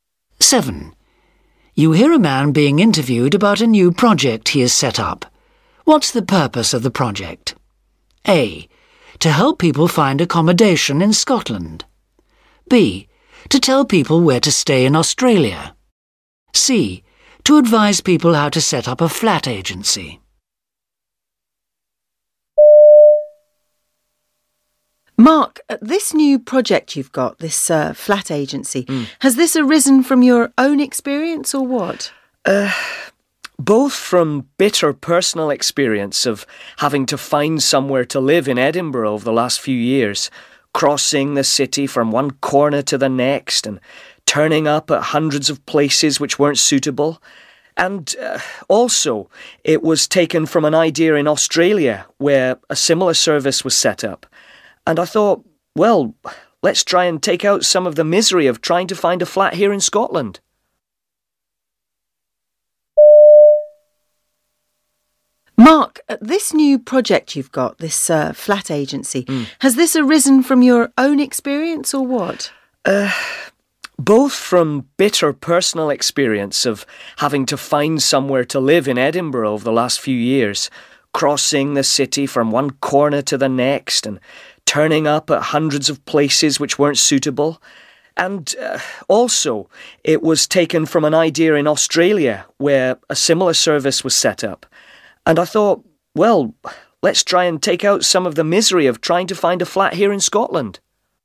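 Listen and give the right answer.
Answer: A: To help people find accommodation in Scotland.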